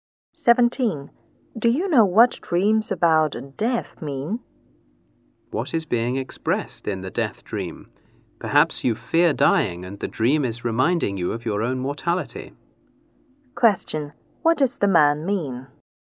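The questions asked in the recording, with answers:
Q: What does the man mean?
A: The dream may show a fear of dying and remind you that you are mortal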